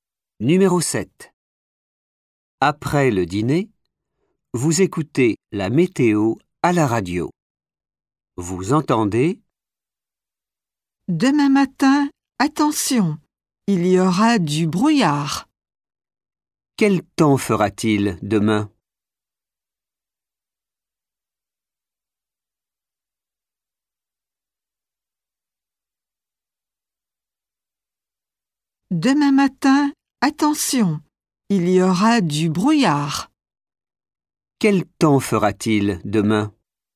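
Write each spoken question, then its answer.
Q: Quel temps fera-t-il demain ?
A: Du brouillard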